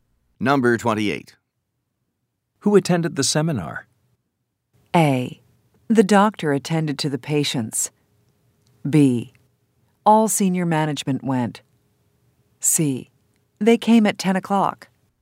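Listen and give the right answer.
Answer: B: All senior management went.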